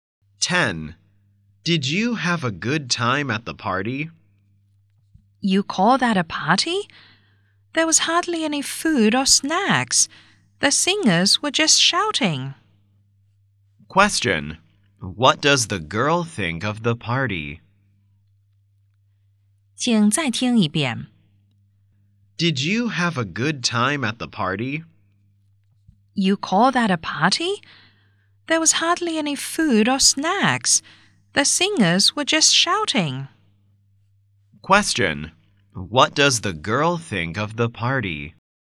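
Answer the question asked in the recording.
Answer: It was bad / disappointing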